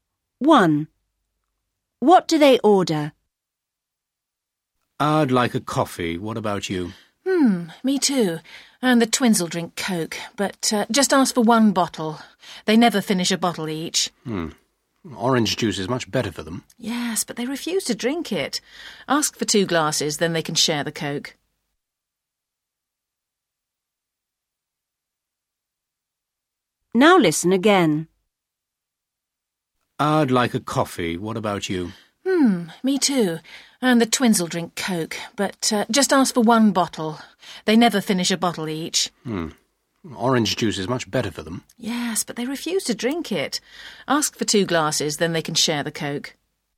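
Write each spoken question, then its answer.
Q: What do they order?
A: Two coffees and one bottle of Coke with two glasses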